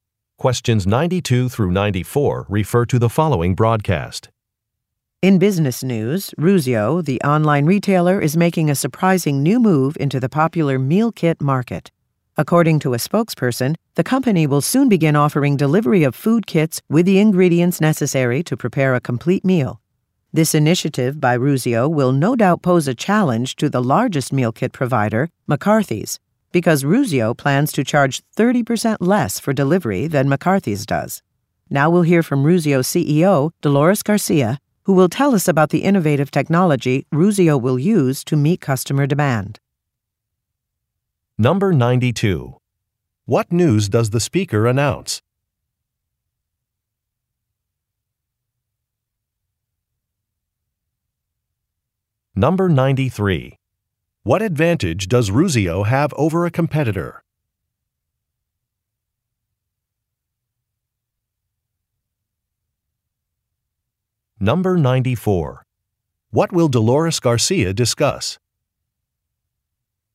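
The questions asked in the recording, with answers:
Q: What news does the speaker announce?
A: Ruzio is entering the meal kit market

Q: What advantage does Ruzio have over a competitor?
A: Cheaper delivery

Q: What will Dolores Garcia discuss?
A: Innovative technology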